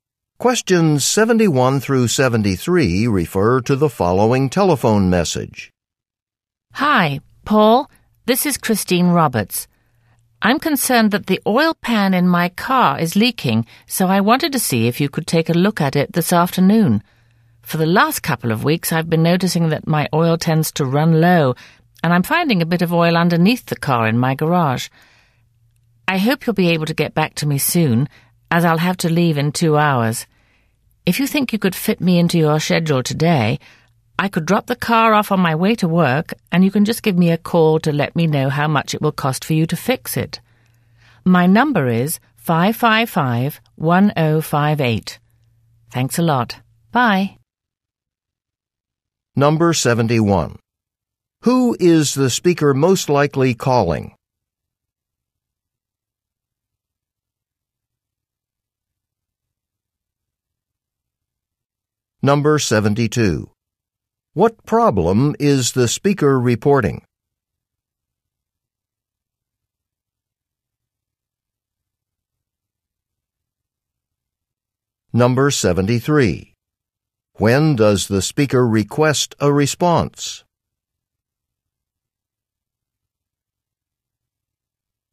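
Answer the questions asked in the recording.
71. A car mechanic
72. Her car is leaking oil
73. Within 2 hours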